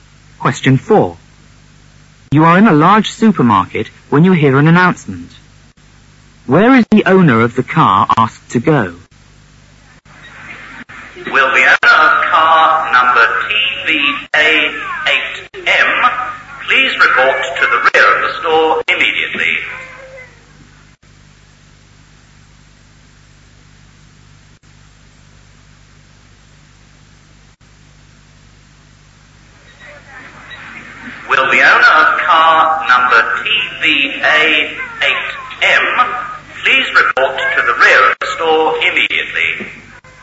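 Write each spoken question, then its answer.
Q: Where is the owner of the car asked to go?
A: To the rear of the store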